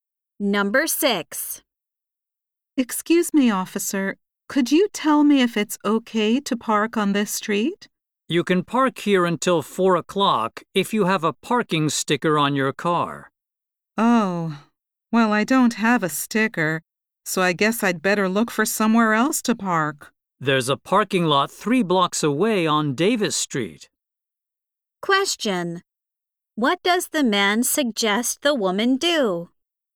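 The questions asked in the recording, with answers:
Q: What does the man suggest the woman do?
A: Park in the parking lot on Davis Street.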